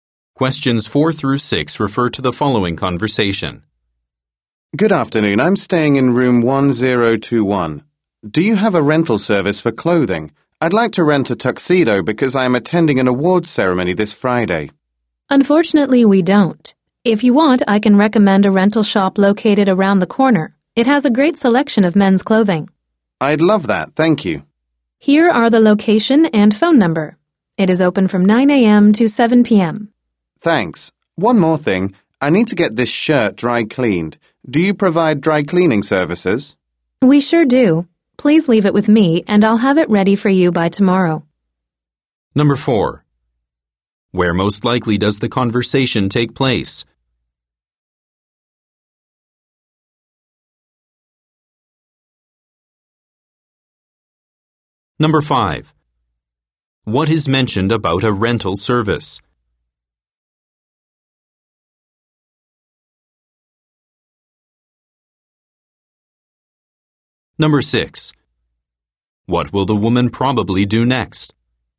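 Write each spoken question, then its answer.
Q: Where most likely does the conversation take place?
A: At a hotel

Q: What is mentioned about a rental service?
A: The hotel does not offer one, but a shop nearby does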